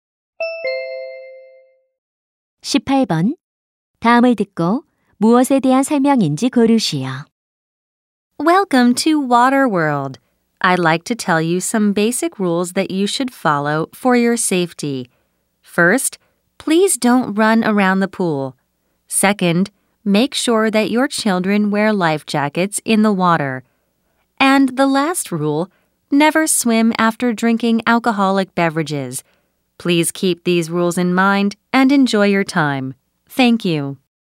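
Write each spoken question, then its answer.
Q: 다음을 듣고 무엇에 대한 설명인지 고르시오.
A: 수영장 안전 수칙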